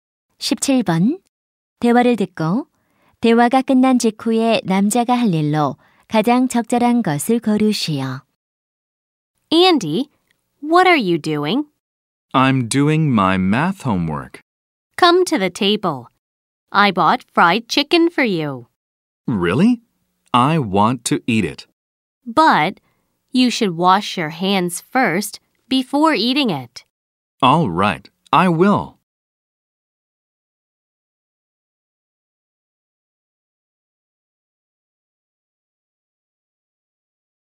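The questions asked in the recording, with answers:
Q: 대화를 듣고 대화가 끝난 직후에 남자가 할 일로 가장 적절한 것을 고르시오.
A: 손 씻기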